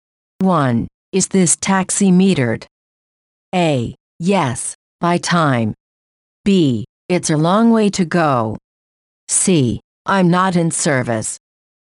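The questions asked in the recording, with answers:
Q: Is this taxi metered?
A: A: Yes, by time.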